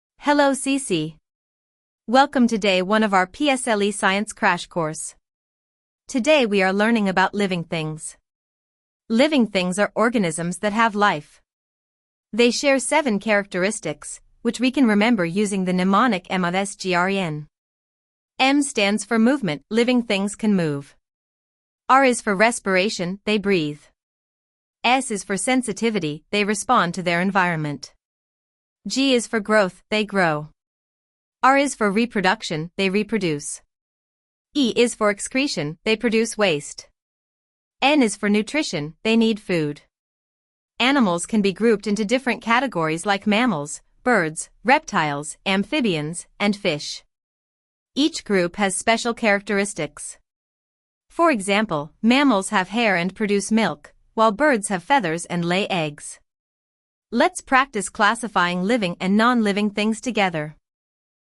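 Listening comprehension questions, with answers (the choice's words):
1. Which is NOT a characteristic of living things?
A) Growth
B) Movement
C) Eating rocks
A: Eating rocks

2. Which animal group has feathers?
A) Mammals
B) Birds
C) Reptiles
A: Birds

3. What does MRS GREN stand for?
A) A mnemonic for living things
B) A type of plant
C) A science experiment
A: A mnemonic for living things

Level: p6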